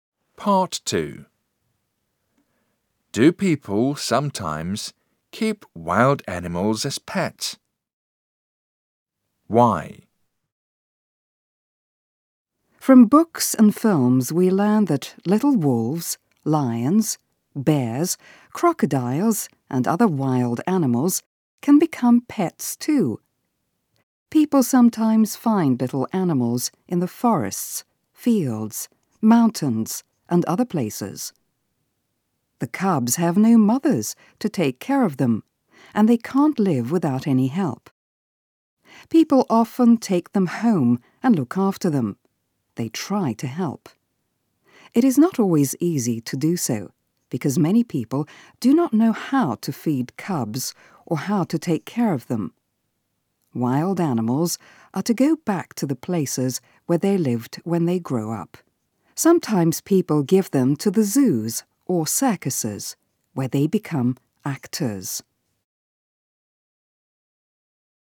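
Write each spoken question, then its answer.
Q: Do people sometimes keep wild animals as pets?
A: Yes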